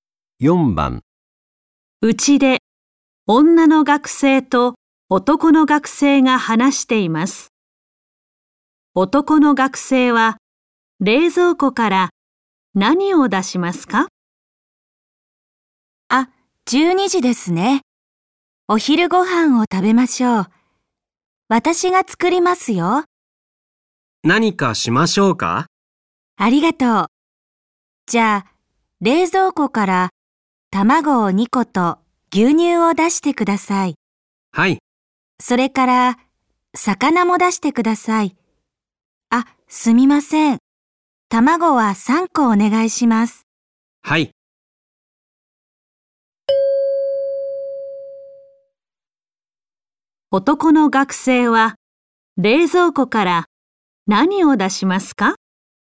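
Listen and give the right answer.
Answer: 卵3個と牛乳と魚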